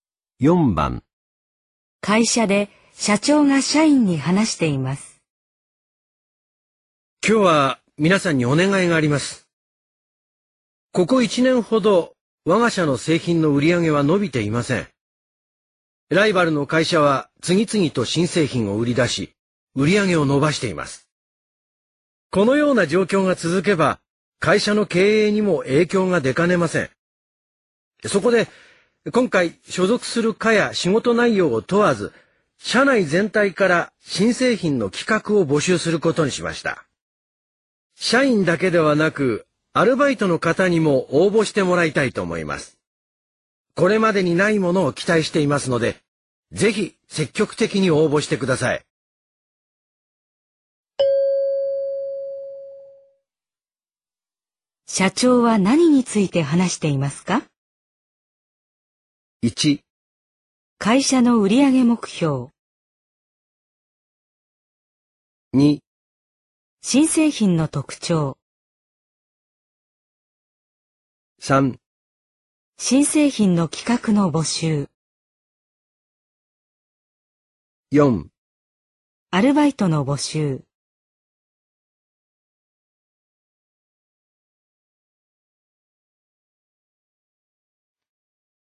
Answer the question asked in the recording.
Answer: 3

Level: N2